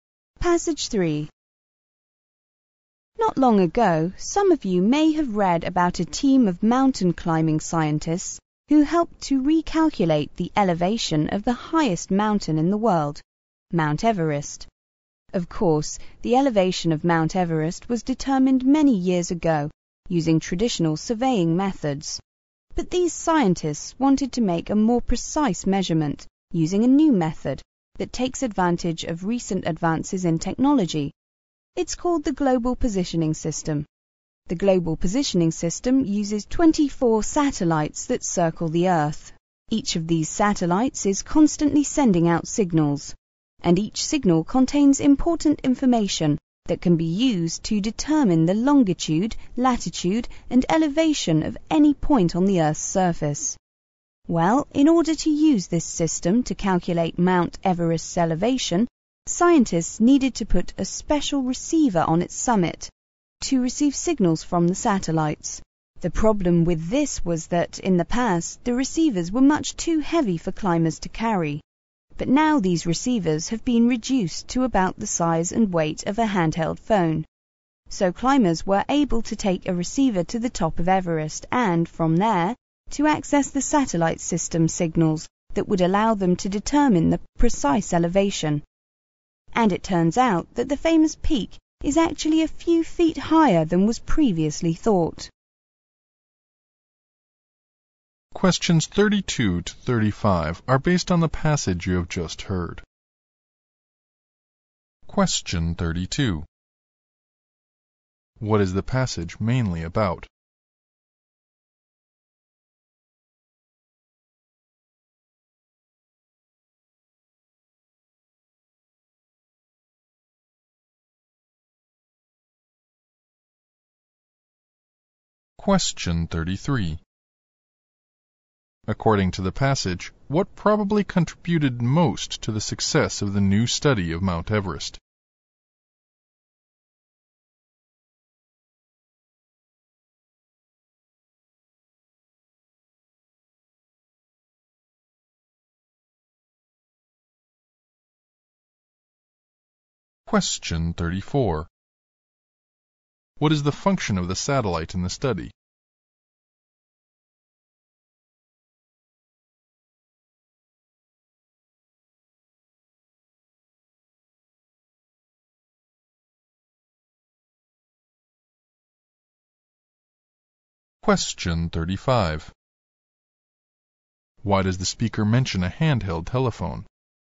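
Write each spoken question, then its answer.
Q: What is the passage mainly about?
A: Using the Global Positioning System to remeasure the elevation of Mount Everest

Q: According to the passage, what probably contributed most to the success of the new study of Mount Everest?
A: The receivers became small and light enough for climbers to carry

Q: What is the function of the satellite in the study?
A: To send out signals used to determine elevation

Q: Why does the speaker mention a handheld telephone?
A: To show how small and light the receivers have become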